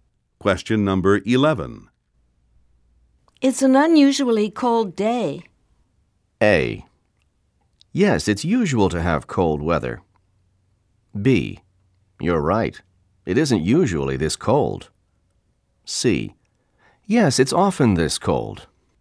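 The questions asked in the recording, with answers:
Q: It's an unusually cold day.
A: B: You're right. It isn't usually this cold.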